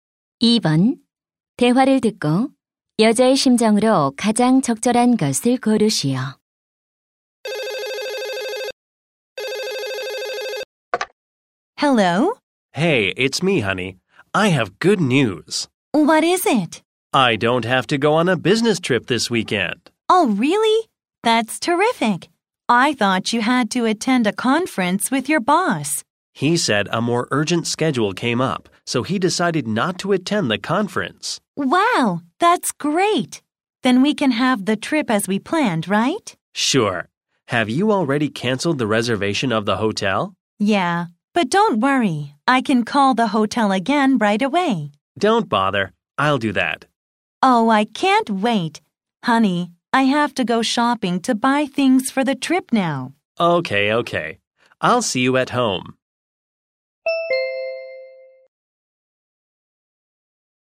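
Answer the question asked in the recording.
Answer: 기쁘고 설렘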